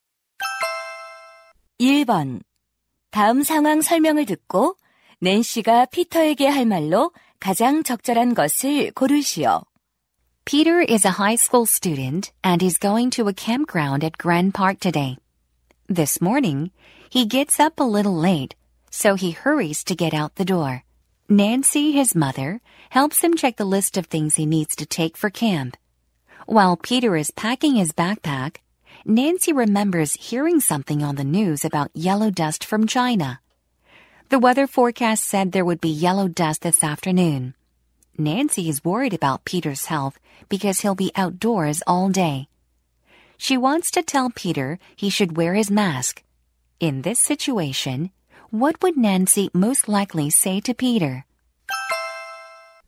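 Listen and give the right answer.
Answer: You should wear your mask because of the yellow dust.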